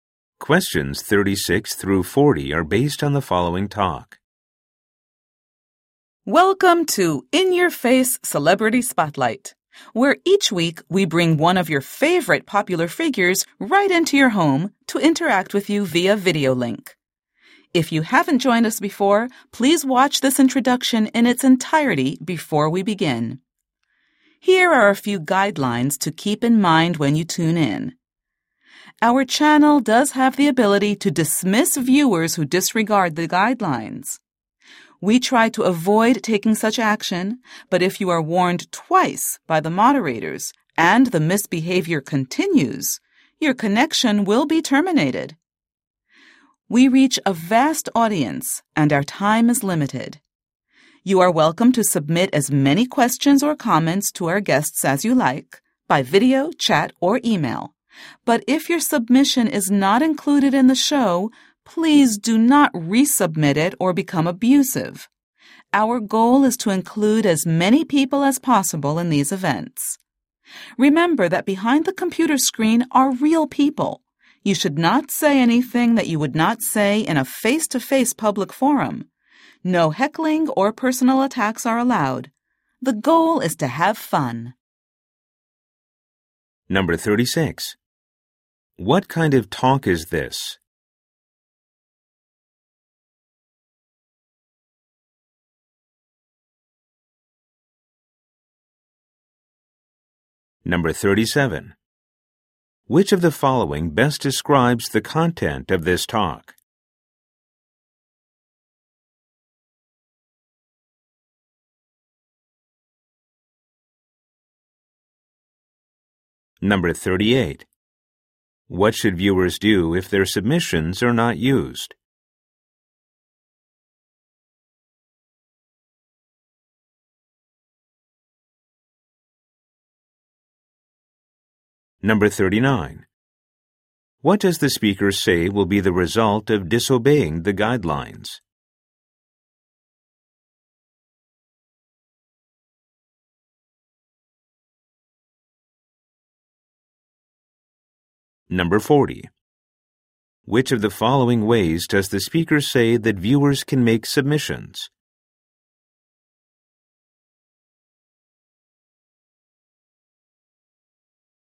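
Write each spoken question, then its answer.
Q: What should viewers do if their submissions are not used?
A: Not resubmit them or become abusive

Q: What does the speaker say will be the result of disobeying the guidelines?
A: After two warnings, their connection will be terminated

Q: Which of the following ways does the speaker say that viewers can make submissions?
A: By video, chat, or email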